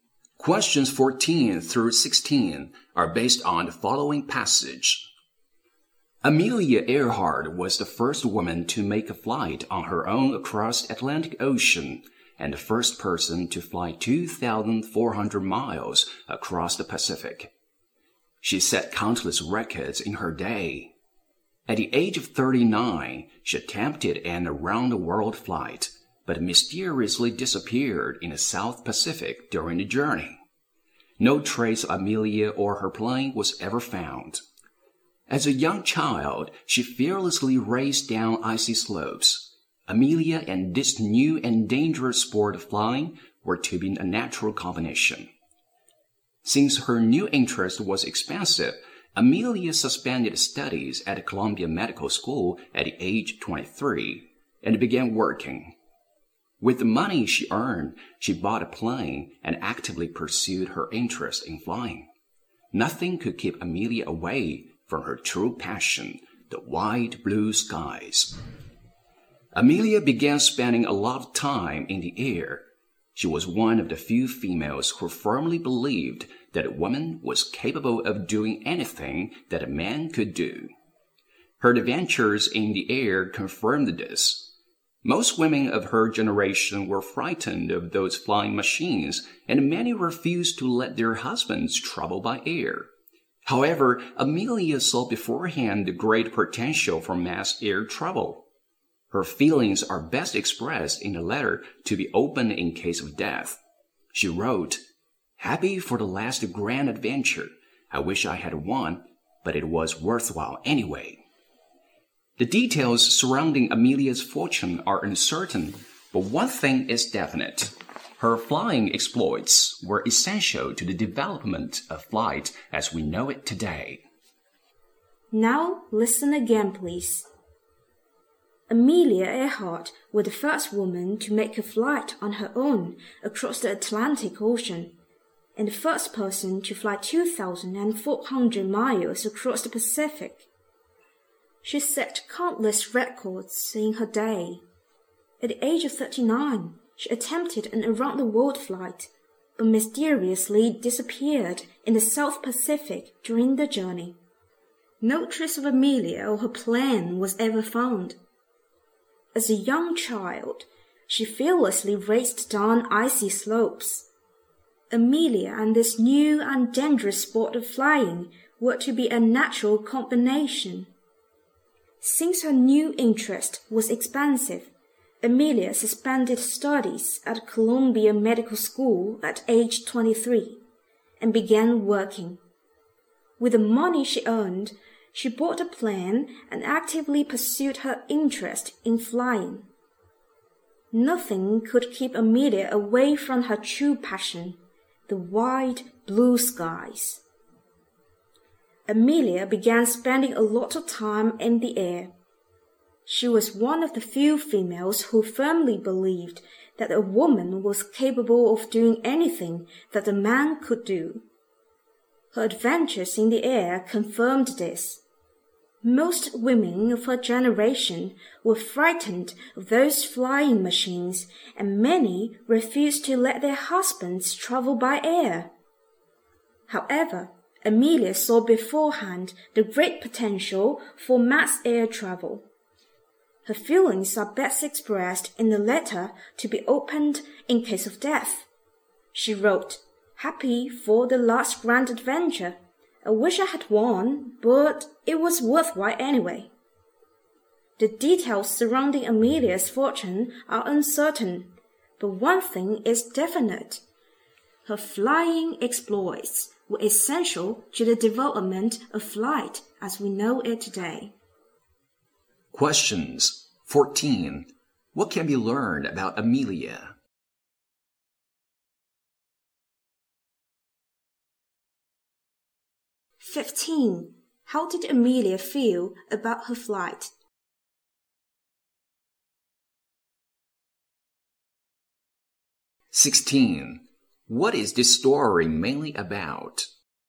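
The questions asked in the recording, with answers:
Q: How did Amelia feel about her flight?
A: It was worthwhile.

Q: What is this story mainly about?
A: Amelia Earhart's flying career and contribution to flight.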